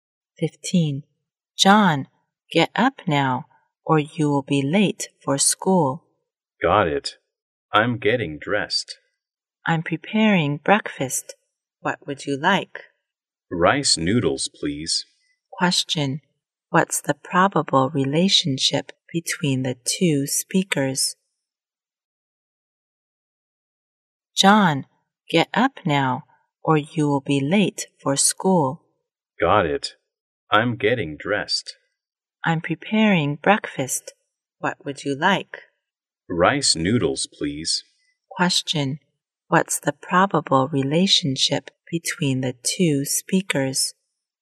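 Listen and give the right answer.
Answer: Mother and son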